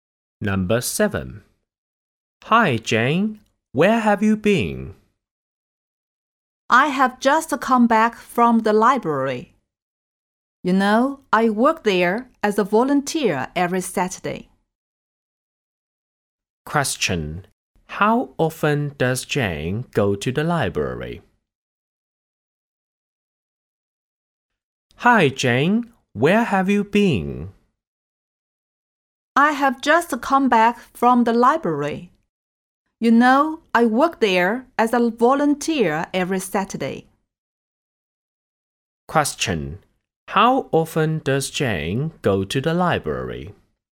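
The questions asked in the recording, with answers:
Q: How often does Jane go to the library?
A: Once a week (every Saturday)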